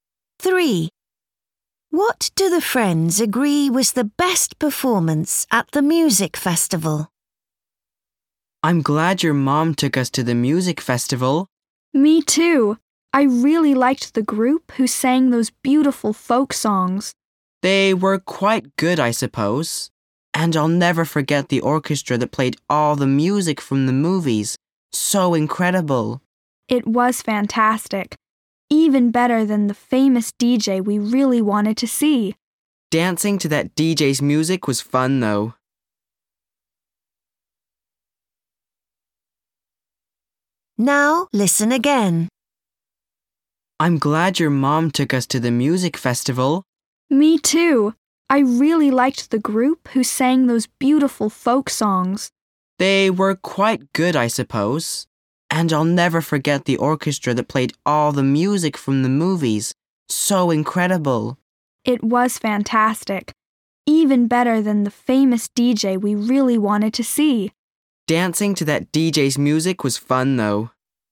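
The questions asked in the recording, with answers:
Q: What do the friends agree was the best performance at the music festival?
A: The orchestra playing music from the movies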